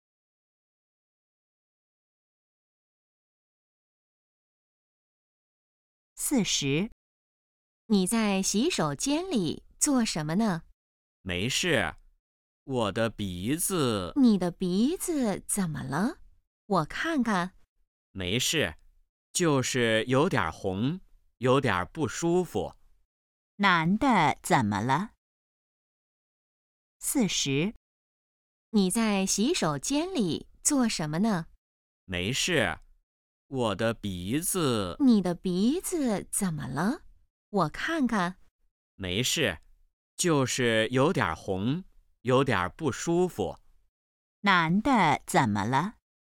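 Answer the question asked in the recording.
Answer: 鼻子有点红,不舒服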